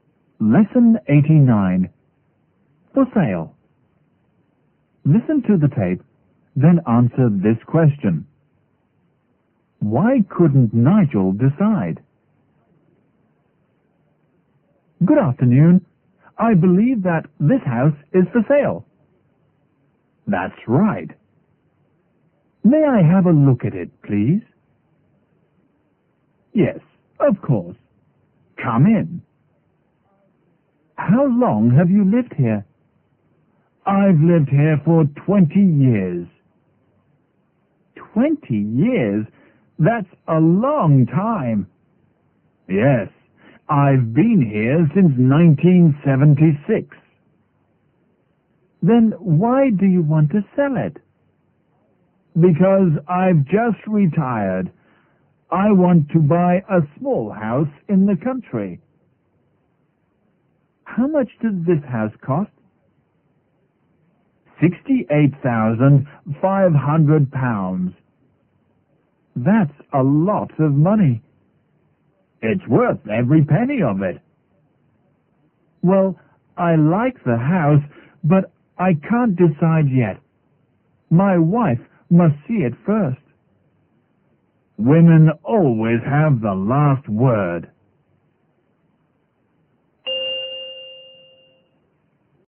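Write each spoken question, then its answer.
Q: Why couldn't Nigel decide?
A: Because his wife must see the house first.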